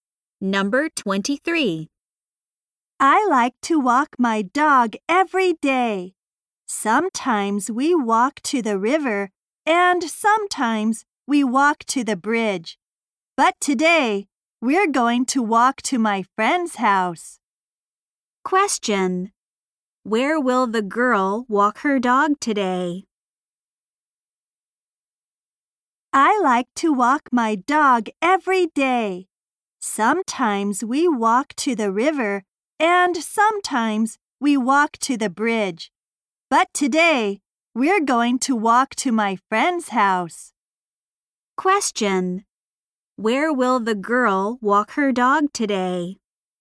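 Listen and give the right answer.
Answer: To her friend's house.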